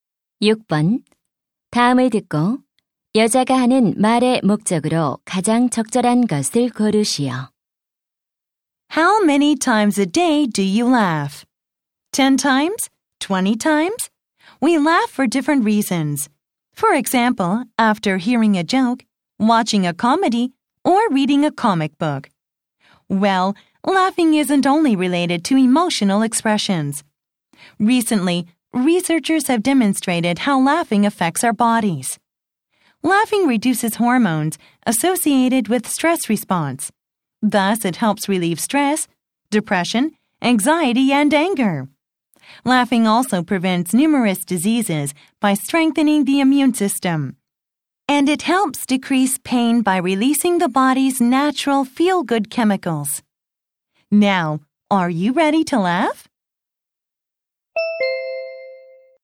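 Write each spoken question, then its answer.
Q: 다음을 듣고 여자가 하는 말의 목적으로 가장 적절한 것을 고르시오.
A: 웃음의 효과를 알리려고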